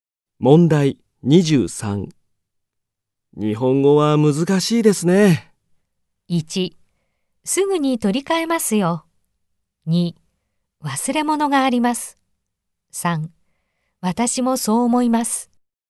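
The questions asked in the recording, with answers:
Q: 日本語は難しいですね。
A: 3: 私もそう思います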